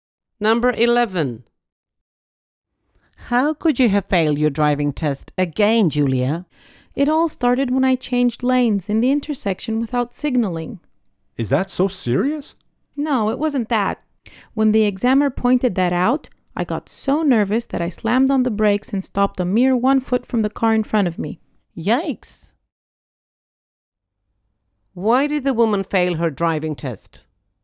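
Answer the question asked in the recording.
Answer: She panicked and slammed on the brakes, nearly hitting the car in front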